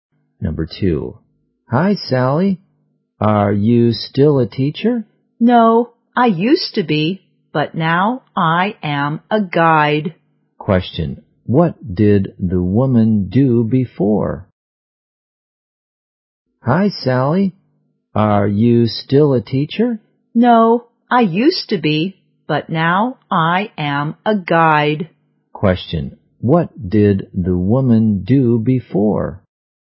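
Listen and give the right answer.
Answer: She was a teacher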